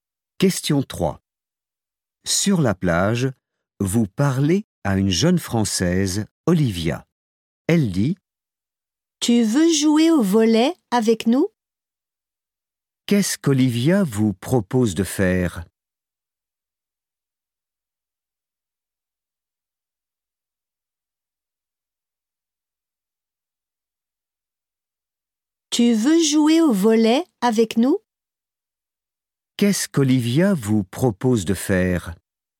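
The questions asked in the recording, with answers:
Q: Qu'est-ce qu'Olivia vous propose de faire ?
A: Jouer au volley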